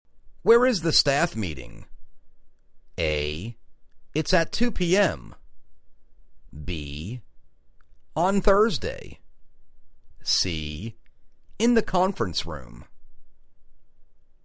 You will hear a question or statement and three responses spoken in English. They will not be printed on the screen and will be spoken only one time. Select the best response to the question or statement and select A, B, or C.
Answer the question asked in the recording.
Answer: In the conference room